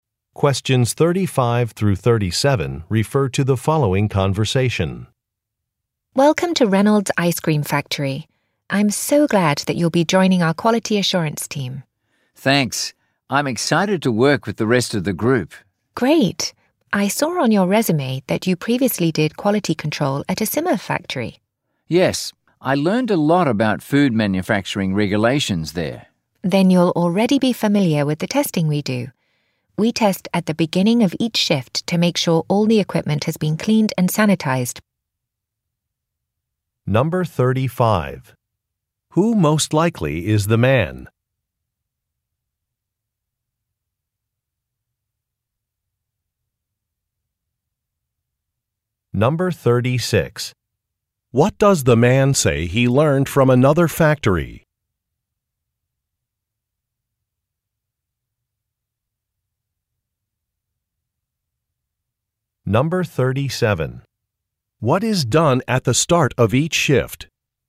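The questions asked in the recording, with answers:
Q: Who most likely is the man?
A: A new quality assurance team member

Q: What does the man say he learned from another factory?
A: Food manufacturing regulations

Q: What is done at the start of each shift?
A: Equipment is tested to make sure it has been cleaned and sanitized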